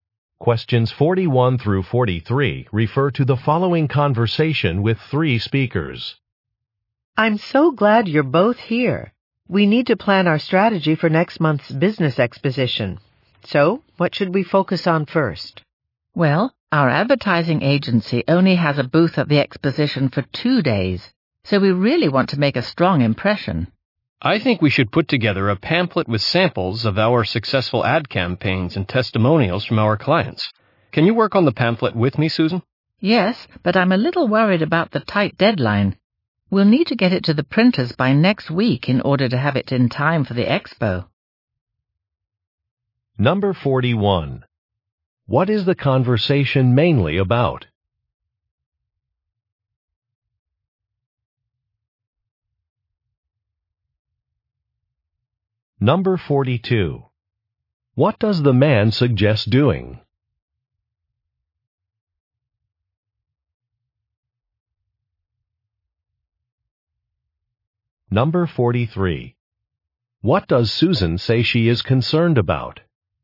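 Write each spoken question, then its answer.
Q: What is the conversation mainly about?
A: Planning for a business exposition

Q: What does the man suggest doing?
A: Making a pamphlet with ad samples and client testimonials

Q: What does Susan say she is concerned about?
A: A tight deadline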